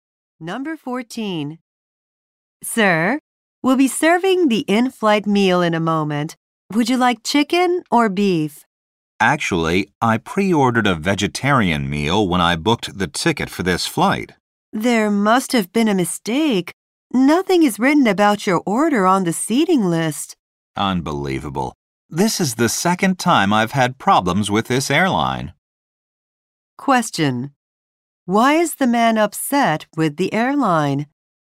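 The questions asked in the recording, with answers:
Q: Why is the man upset with the airline?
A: His pre-ordered vegetarian meal was not recorded.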